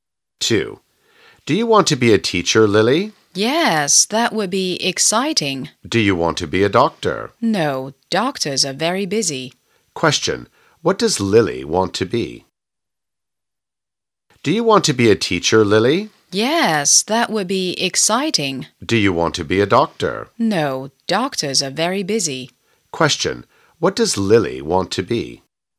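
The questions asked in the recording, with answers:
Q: What does Lily want to be?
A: A teacher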